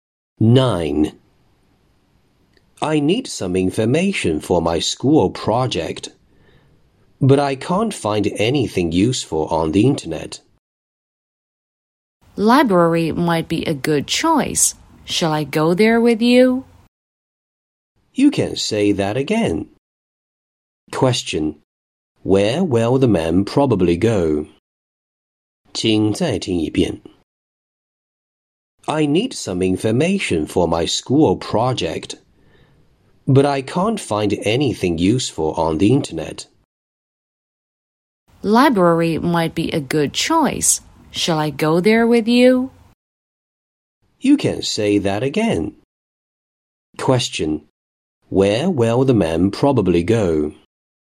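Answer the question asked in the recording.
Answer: To the library.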